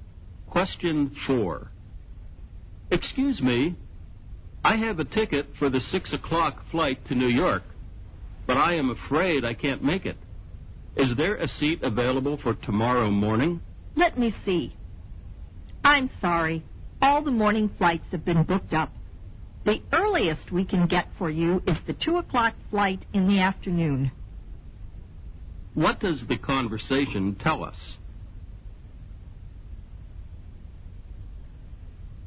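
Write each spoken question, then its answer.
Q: What does the conversation tell us?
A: The man can't get a morning flight; the earliest is the 2 o'clock afternoon flight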